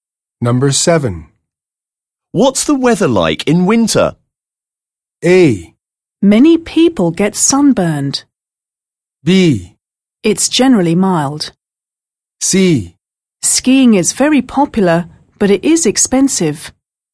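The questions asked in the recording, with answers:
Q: What's the weather like in winter?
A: B: It's generally mild.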